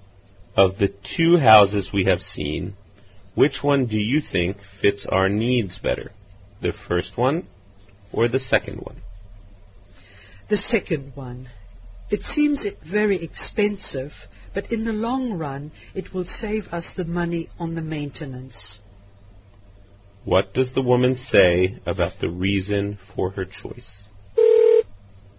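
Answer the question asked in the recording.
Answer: The second house will save money on maintenance in the long run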